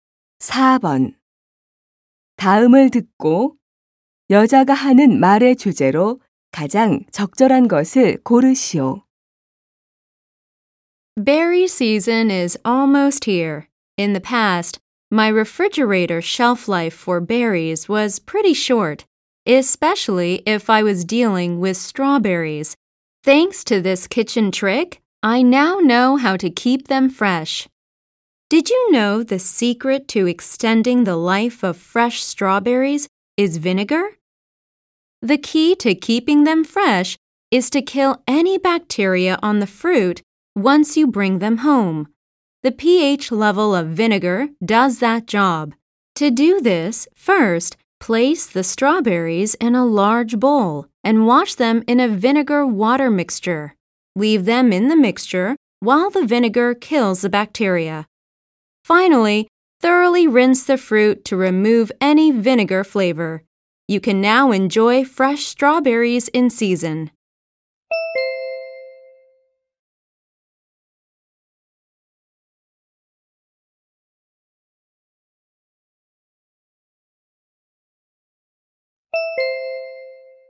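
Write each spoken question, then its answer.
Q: 다음을 듣고 여자가 하는 말의 주제로 가장 적절한 것을 고르시오.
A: 식초를 이용해 딸기를 신선하게 보관하는 방법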